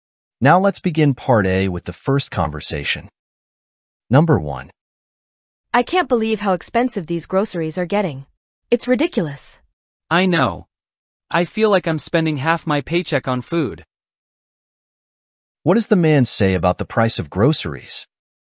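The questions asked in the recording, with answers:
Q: What does the man say about the price of groceries?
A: Groceries are getting very expensive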